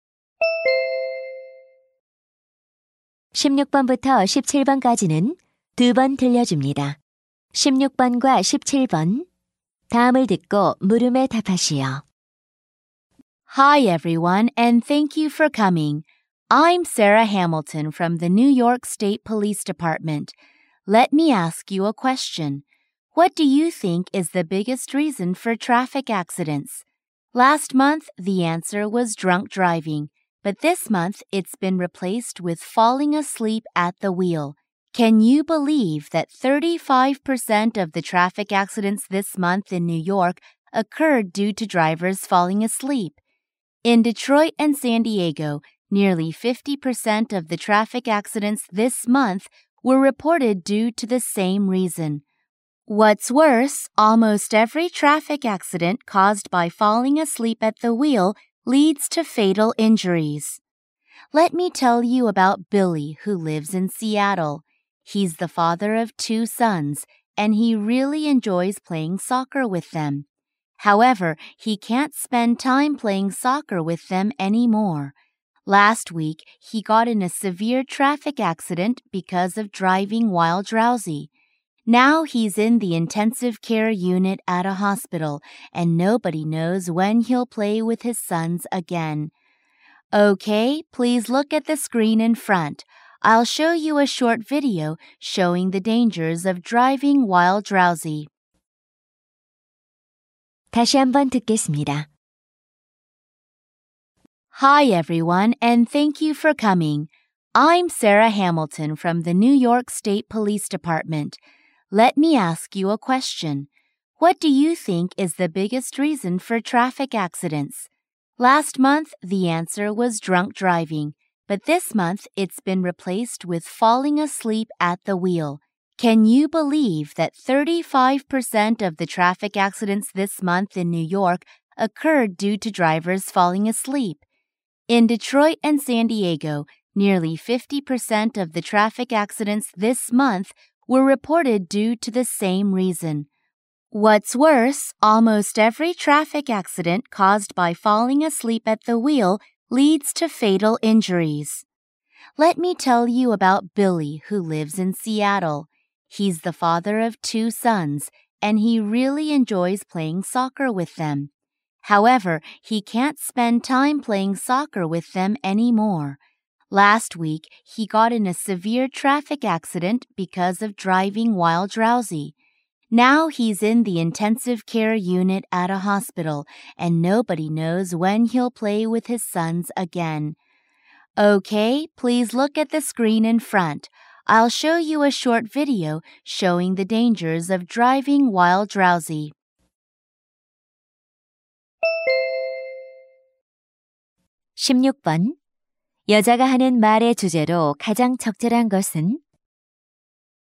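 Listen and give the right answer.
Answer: 졸음운전의 위험성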